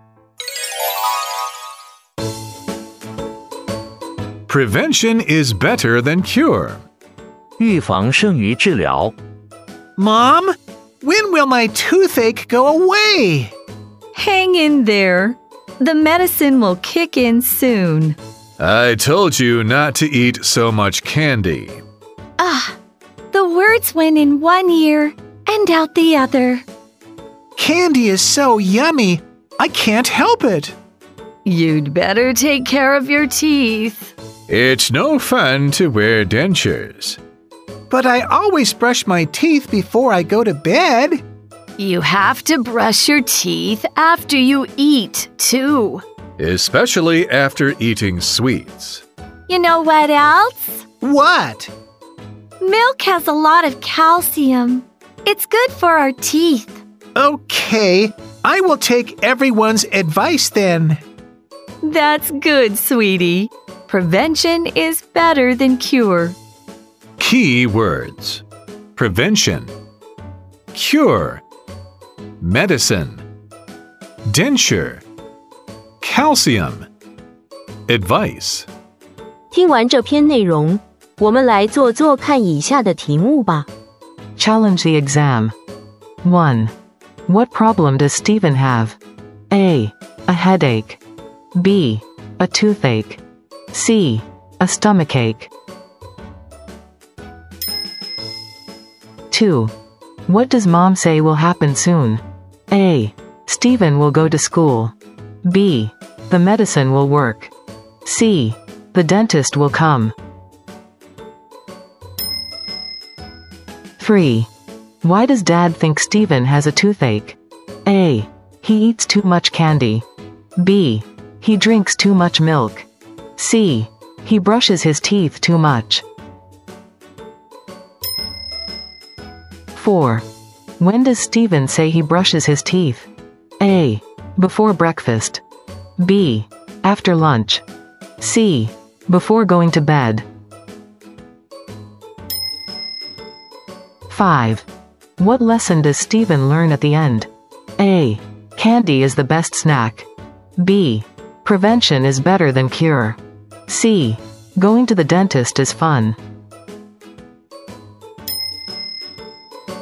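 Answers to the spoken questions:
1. B: A toothache.
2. B: The medicine will work.
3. A: He eats too much candy.
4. C: Before going to bed.
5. B: Prevention is better than cure.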